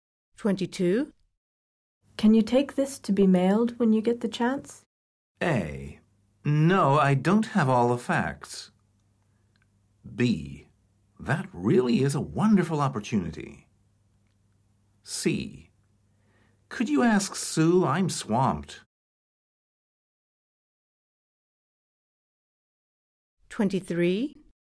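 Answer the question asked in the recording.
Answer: C: Could you ask Sue? I'm swamped.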